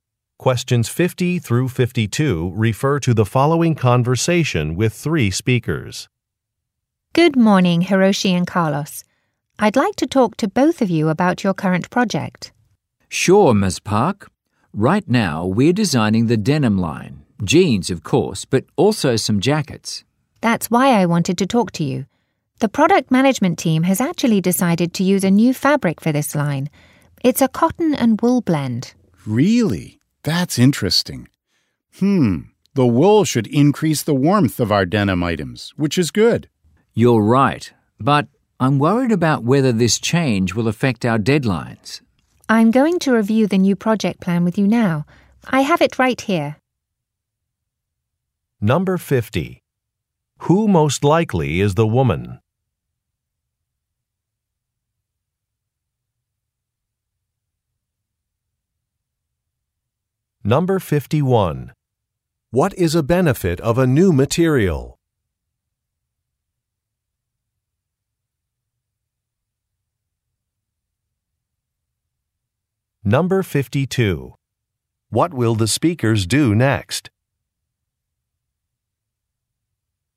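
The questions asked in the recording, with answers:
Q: What is a benefit of a new material?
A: It makes the denim items warmer

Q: What will the speakers do next?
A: Review the new project plan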